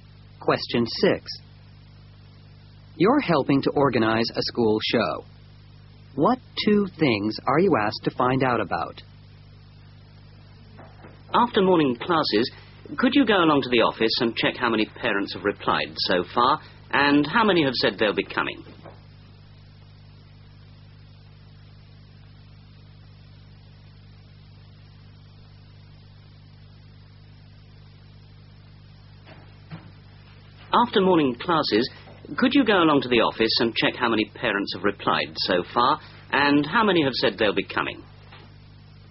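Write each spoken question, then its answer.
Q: What two things are you asked to find out about?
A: How many parents have replied so far and how many are coming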